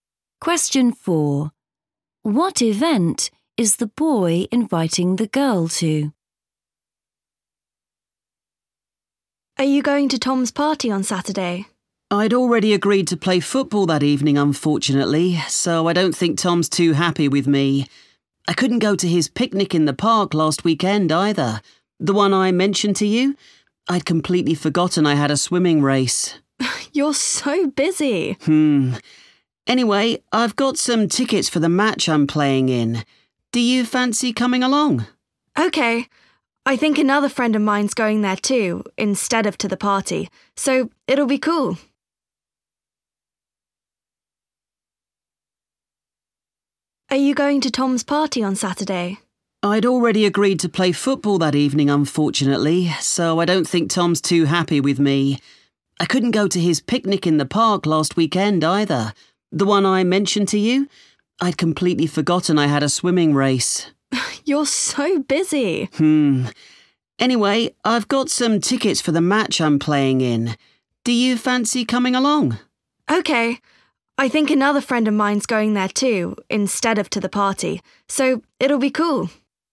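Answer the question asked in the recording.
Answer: a football match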